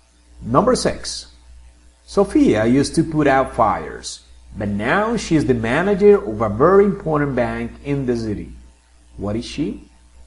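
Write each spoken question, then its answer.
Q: What is she?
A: a bank manager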